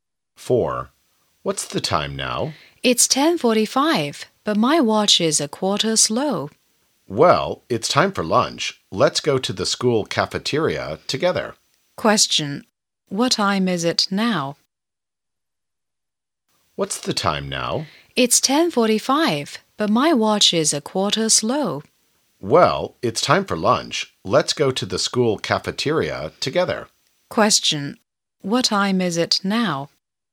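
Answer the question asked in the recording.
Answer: 11:00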